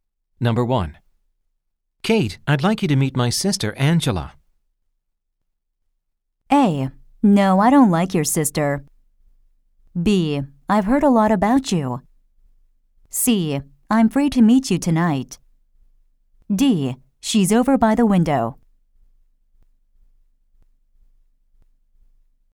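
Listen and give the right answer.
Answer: B: I've heard a lot about you.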